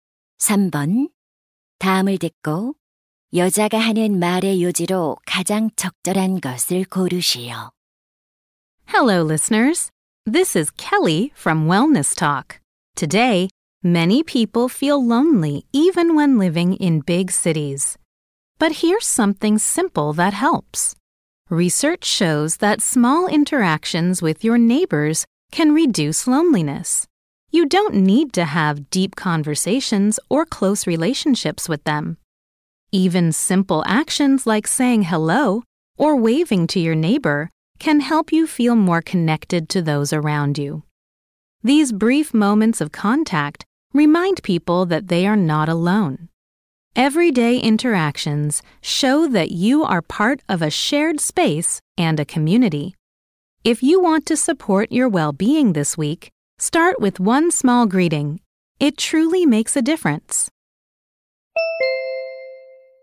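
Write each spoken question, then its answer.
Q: 다음을 듣고 여자가 하는 말의 요지로 가장 적절한 것을 고르시오.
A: 이웃과의 사소한 교류가 외로움을 줄여 준다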